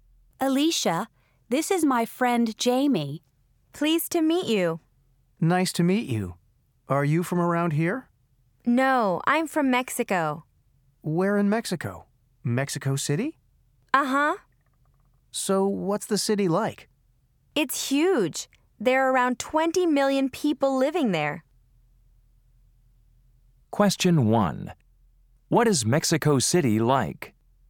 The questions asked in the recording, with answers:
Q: What is Mexico City like?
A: Wow, that's a really big city.